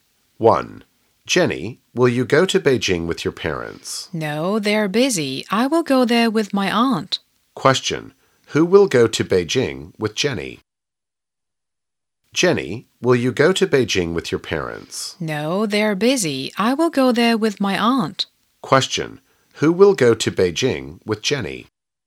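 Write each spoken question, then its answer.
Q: Who will go to Beijing with Jenny?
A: Her aunt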